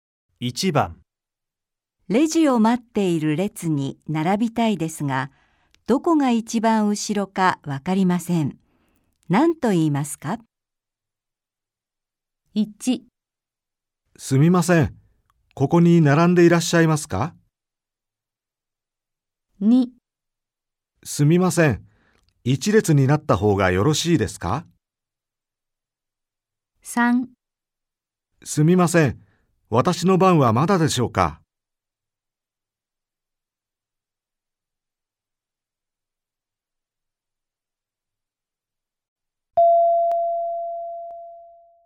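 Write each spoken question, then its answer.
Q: レジを待っている列に並びたいですが、どこが一番後ろかわかりません。 何と言いますか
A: 1: すみません。ここに並んでいらっしゃいますか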